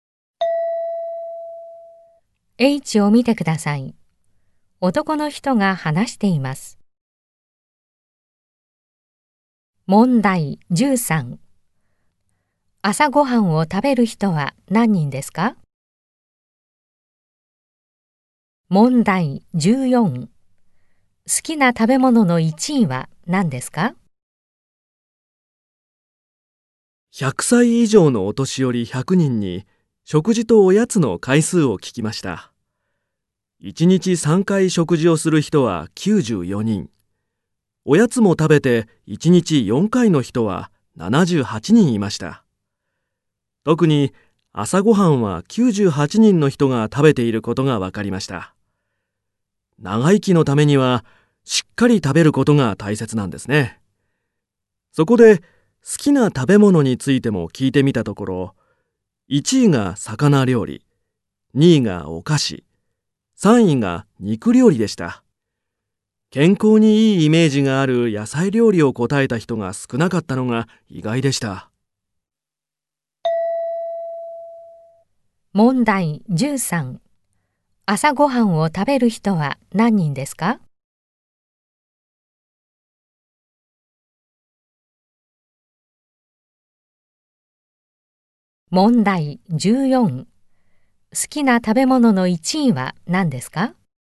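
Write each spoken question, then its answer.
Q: 朝ごはんを食べる人は何人ですか?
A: 98人

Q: 好きな食べ物の1位は何ですか?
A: 魚料理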